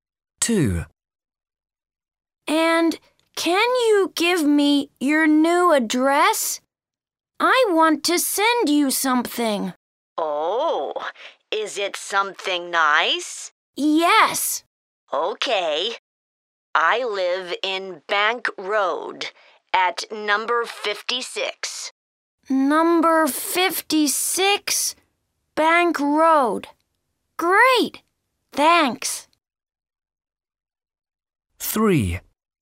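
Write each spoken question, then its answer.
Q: And can you give me your new address?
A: 56 Bank Road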